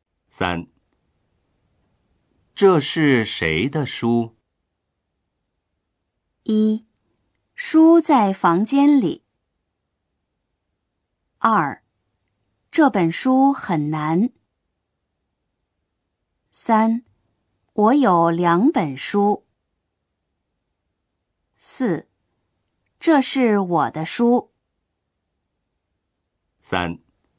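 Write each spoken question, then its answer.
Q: 这是谁的书?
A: 4: 这是我的书。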